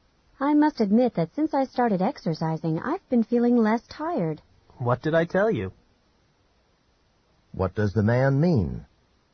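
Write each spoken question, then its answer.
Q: What does the man mean?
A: He had told her exercise would make her less tired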